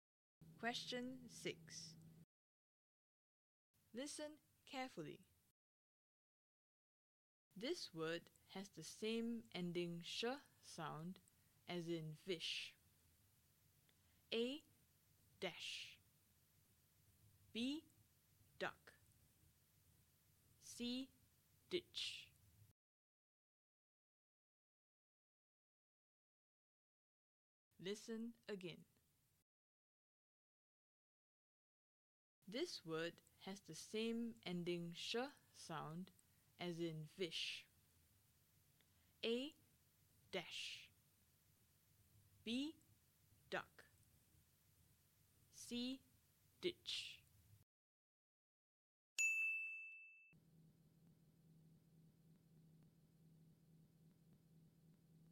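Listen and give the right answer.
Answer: A: Dash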